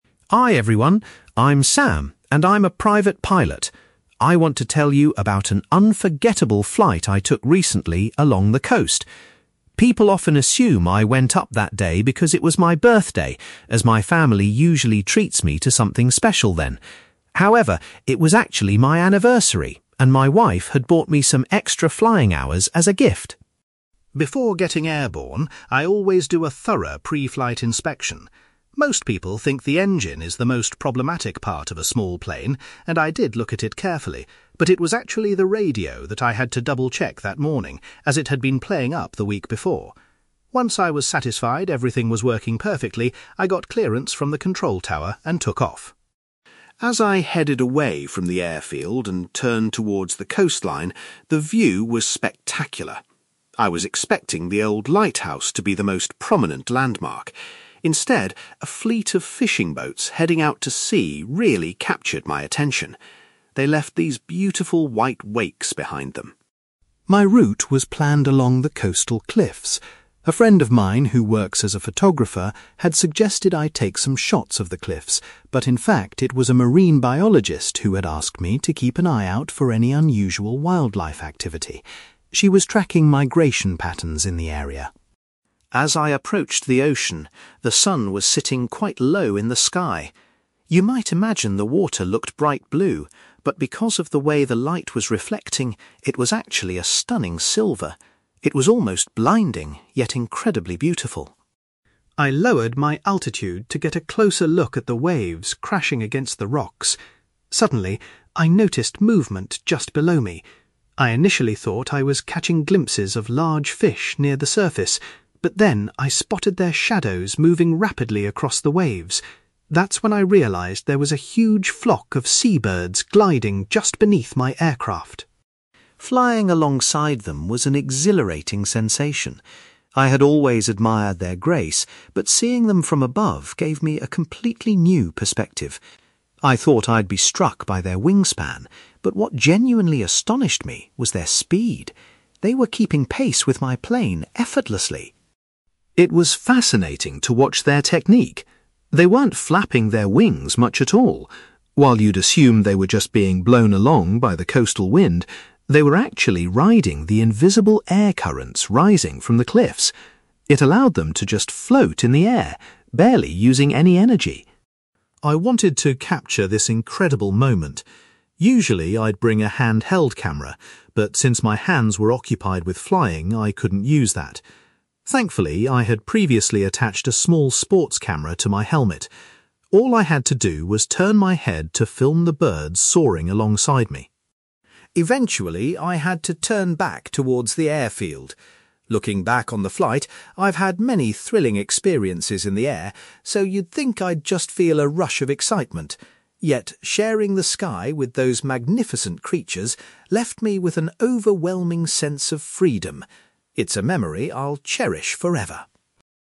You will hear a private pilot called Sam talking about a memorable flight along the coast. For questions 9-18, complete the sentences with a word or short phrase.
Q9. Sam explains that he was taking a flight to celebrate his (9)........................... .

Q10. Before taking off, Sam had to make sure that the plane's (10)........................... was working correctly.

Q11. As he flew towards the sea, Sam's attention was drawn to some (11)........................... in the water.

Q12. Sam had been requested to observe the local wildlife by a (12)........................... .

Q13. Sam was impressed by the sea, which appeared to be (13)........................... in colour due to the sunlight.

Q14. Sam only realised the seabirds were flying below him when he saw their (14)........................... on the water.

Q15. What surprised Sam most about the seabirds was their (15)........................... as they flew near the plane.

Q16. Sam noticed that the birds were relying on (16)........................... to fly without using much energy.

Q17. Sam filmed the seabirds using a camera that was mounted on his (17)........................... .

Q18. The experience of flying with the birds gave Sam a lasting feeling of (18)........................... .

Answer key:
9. anniversary
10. radio
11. fishing boats
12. marine biologist
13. silver
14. shadows
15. speed
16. air currents
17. helmet
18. freedom

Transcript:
Sam: Hi everyone. I'm Sam, and I'm a private pilot. I want to tell you about an unforgettable flight I took recently along the coast. People often assume I went up that day because it was my birthday, as my family usually treats me to something special then. However, it was actually my anniversary, and my wife had bought me some extra flying hours as a gift.
Before getting airborne, I always do a thorough pre-flight inspection. Most people think the engine is the most problematic part of a small plane, and I did look at it carefully, but it was actually the radio that I had to double-check that morning, as it had been playing up the week before. Once I was satisfied everything was working perfectly, I got clearance from the control tower and took off.
As I headed away from the airfield and turned towards the coastline, the view was spectacular. I was expecting the old lighthouse to be the most prominent landmark. Instead, a fleet of fishing boats heading out to sea really captured my attention. They left these beautiful white wakes behind them.
My route was planned along the coastal cliffs. A friend of mine who works as a photographer had suggested I take some shots of the cliffs, but in fact, it was a marine biologist who had asked me to keep an eye out for any unusual wildlife activity. She was tracking migration patterns in the area.
As I approached the ocean, the sun was sitting quite low in the sky. You might imagine the water looked bright blue, but because of the way the light was reflecting, it was actually a stunning silver. It was almost blinding, yet incredibly beautiful.
I lowered my altitude to get a closer look at the waves crashing against the rocks. Suddenly, I noticed movement just below me. I initially thought I was catching glimpses of large fish near the surface, but then I spotted their shadows moving rapidly across the waves. That's when I realised there was a huge flock of seabirds gliding just beneath my aircraft!
Flying alongside them was an exhilarating sensation. I had always admired their grace, but seeing them from above gave me a completely new perspective. I thought I'd be struck by their wingspan, but what genuinely astonished me was their speed. They were keeping pace with my plane effortlessly!
It was fascinating to watch their technique. They weren't flapping their wings much at all. While you'd assume they were just being blown along by the coastal wind, they were actually riding the invisible air currents rising from the cliffs. It allowed them to just float in the air, barely using any energy.
I wanted to capture this incredible moment. Usually, I'd bring a handheld camera, but since my hands were occupied with flying, I couldn't use that. Thankfully, I had previously attached a small sports camera to my helmet. All I had to do was turn my head to film the birds soaring alongside me.
Eventually, I had to turn back towards the airfield. Looking back on the flight, I've had many thrilling experiences in the air, so you'd think I'd just feel a rush of excitement. Yet, sharing the sky with those magnificent creatures left me with an overwhelming sense of freedom. It's a memory I'll cherish forever.

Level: B2